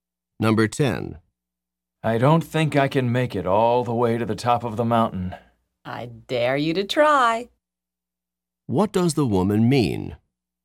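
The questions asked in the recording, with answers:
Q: What does the woman mean?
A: She is challenging the man to try to climb to the top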